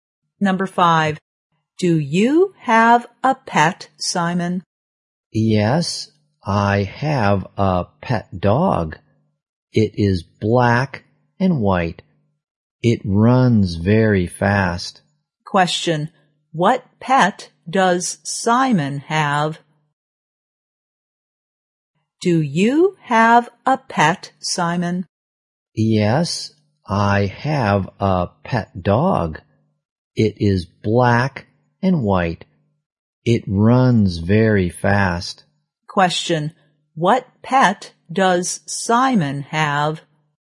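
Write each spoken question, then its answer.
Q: What pet does Simon have?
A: A black and white dog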